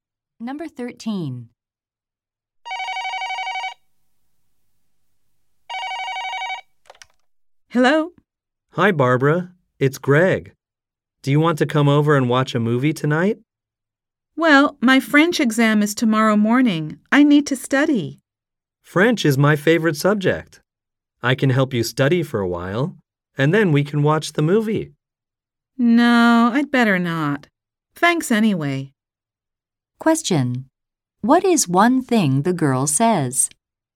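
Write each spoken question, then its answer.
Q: What is one thing the girl says?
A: She needs to study for her French exam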